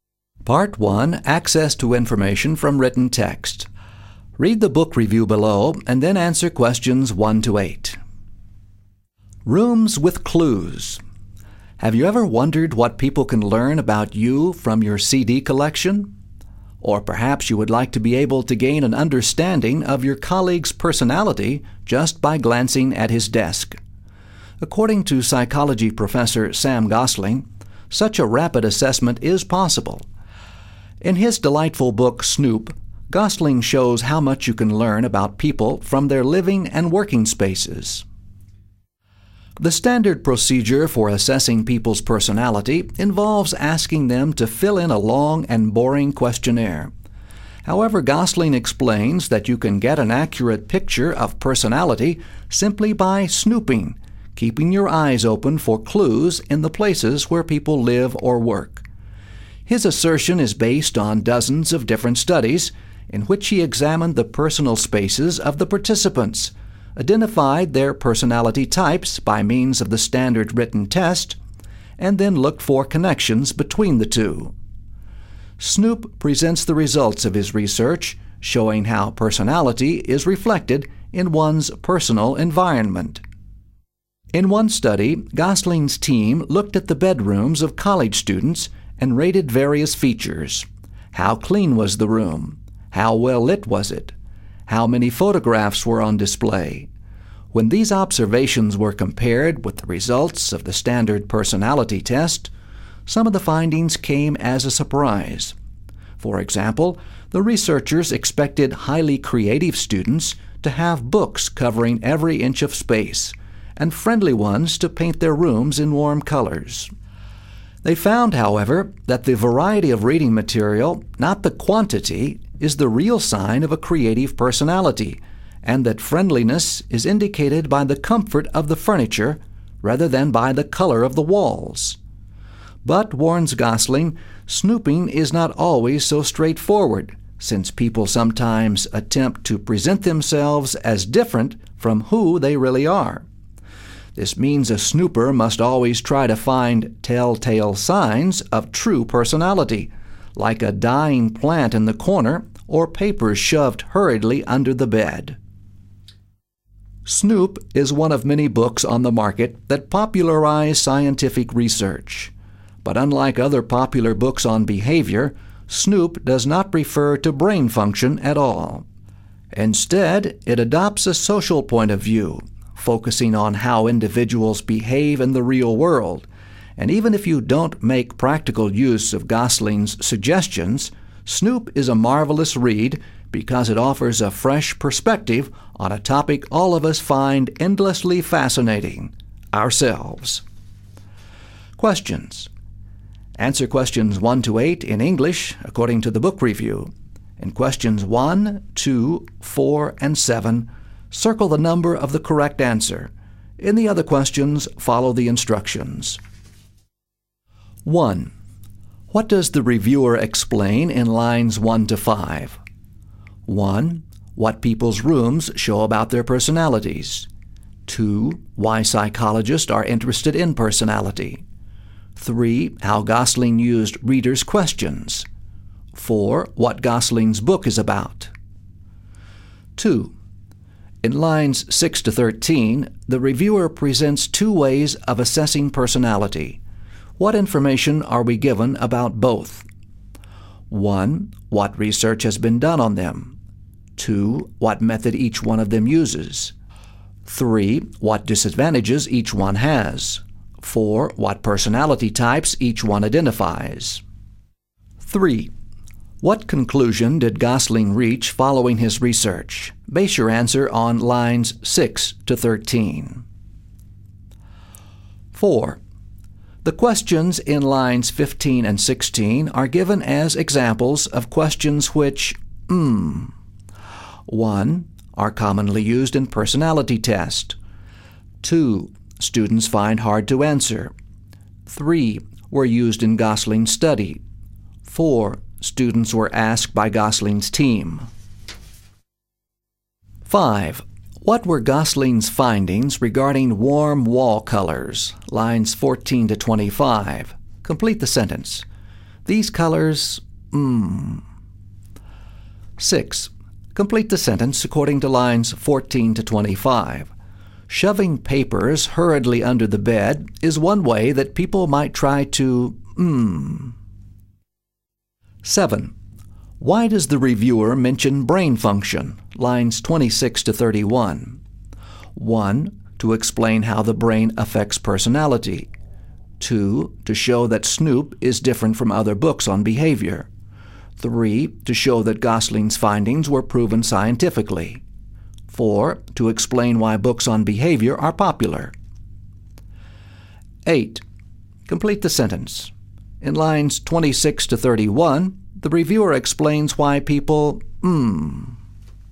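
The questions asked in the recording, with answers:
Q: In lines 6 to 13, the reviewer presents two ways of assessing personality. What information are we given about both?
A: 2: What method each one of them uses

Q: What conclusion did Gosling reach following his research?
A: You can get an accurate picture of personality from people's personal spaces (personality is reflected in one's environment)

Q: The questions in lines 15 and 16 are given as examples of questions which,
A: 3: Were used in Gosling's study.

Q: What were Gosling's findings regarding warm wall colors?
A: They do not indicate friendliness; comfortable furniture does

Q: Shoving papers hurriedly under the bed is one way that people might try to,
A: present themselves as different from who they really are

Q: Why does the reviewer mention brain function?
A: 2: To show that Snoop is different from other books on behavior.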